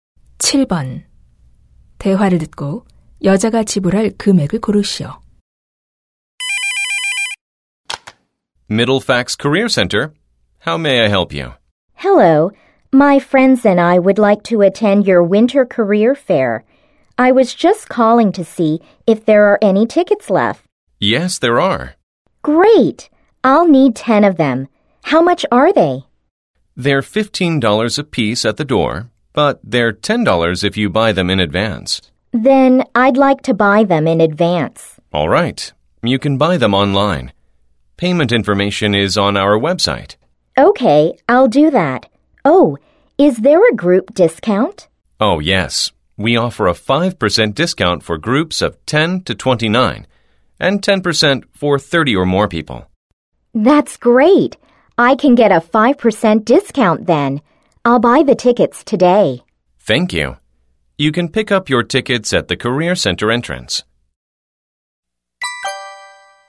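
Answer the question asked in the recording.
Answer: $95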